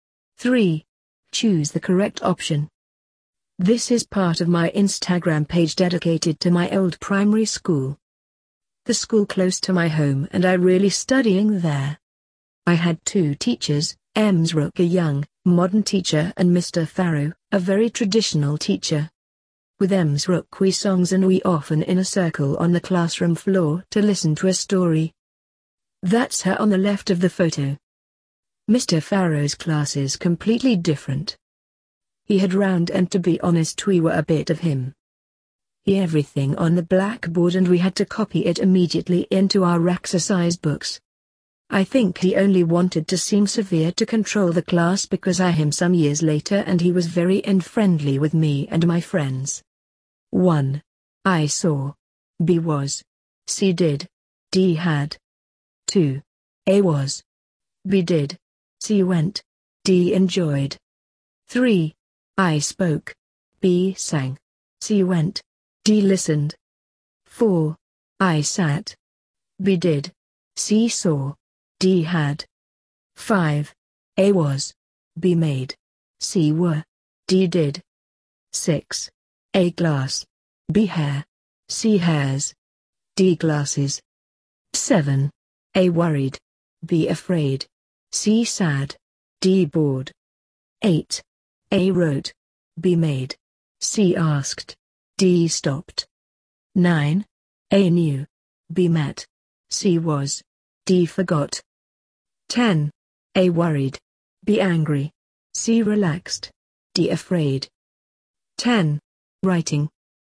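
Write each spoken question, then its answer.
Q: 1. I saw. B was. C did. D had.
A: B: was

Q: 2. A was. B did. C went. D enjoyed.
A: D: enjoyed

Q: 3. I spoke. B sang. C went. D listened.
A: B: sang

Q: 4. I sat. B did. C saw. D had.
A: A: sat

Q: 5. A was. B made. C were. D did.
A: A: was

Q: 6. A glass. B hair. C hairs. D glasses.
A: D: glasses

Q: 7. A worried. B afraid. C sad. D bored.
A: B: afraid

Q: 8. A wrote. B made. C asked. D stopped.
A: A: wrote

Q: 9. A knew. B met. C was. D forgot.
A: B: met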